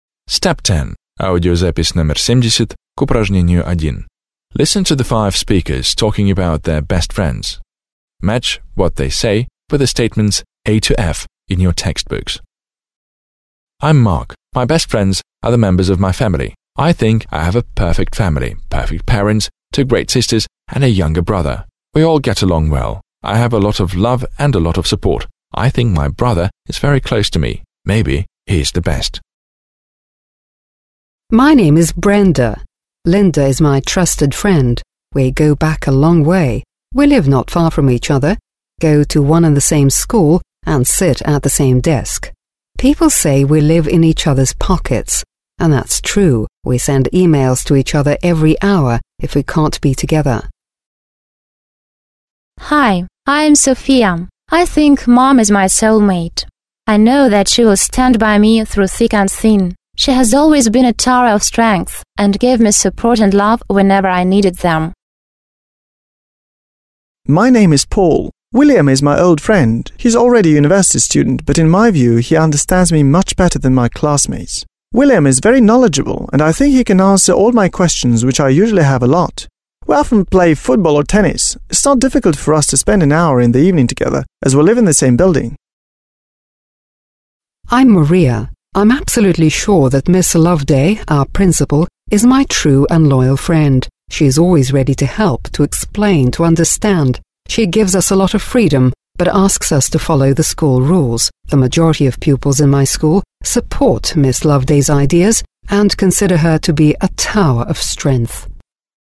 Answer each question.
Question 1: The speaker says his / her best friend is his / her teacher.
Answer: 5

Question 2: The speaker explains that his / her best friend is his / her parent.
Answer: 3

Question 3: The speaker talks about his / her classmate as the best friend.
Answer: 2

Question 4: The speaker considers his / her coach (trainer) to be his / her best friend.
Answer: extra

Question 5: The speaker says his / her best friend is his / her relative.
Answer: 1

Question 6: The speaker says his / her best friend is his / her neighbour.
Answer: 4

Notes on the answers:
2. Hi! I'm Sophi. I think mum is my soul mate. I know that she will stand by me through thick and thin. She has always been a tower of strength and given me support and love whenever I needed them.

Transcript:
1) I'm Mark. My best friends are the members of my family. I think I have a perfect family: perfect parents, two great sisters and a younger brother. We all get along well. I have a lot of love and a lot of support. I think my brother is very close to me. Maybe he is the best.
2) My name is Brenda. Linda is my trusted friend. We go back a long way. We live not far from each other, go to one and the same school and sit at the same desk. People say we live in each other's pockets and that's true. We send e-mails to each other every hour if we can't be together.
I know that she will stand by me through thick and thin. She has always been a tower of strength and given me support and love whenever I needed them.
William is my old friend. He is already a university student, but in my view he understands me much better than my classmates. William is very knowledgeable and I think he can answer all my questions which I usually have a lot of. We often play football or tennis. It's not difficult for us to spend an hour in the evening together as we live in the same building.
5) I'm Maria. I'm absolutely sure that Miss Loveday, our principal, is my true and loyal friend. She is always ready to help, to explain and to understand. She gives us a lot of freedom but asks us to follow the school rules. The majority of pupils in my school support Miss Loveday's ideas and consider her to be a tower of strength.

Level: 9 класс